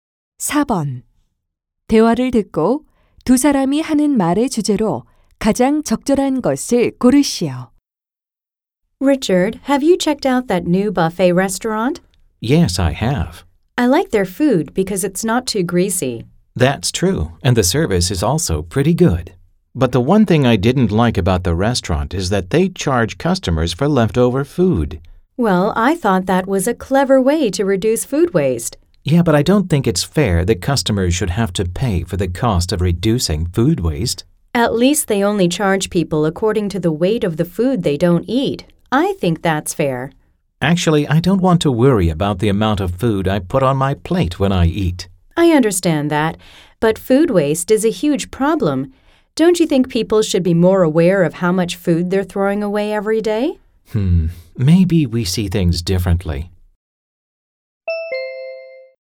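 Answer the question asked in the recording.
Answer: 뷔페 식당에서 남긴 음식에 요금을 부과하는 것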